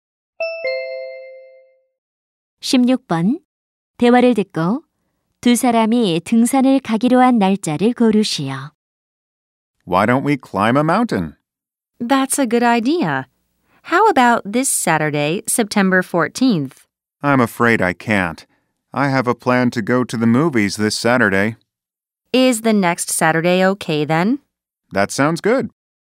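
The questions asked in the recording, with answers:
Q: 대화를 듣고 두 사람이 등산을 가기로 한 날짜를 고르시오.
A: 9월 21일 (토요일)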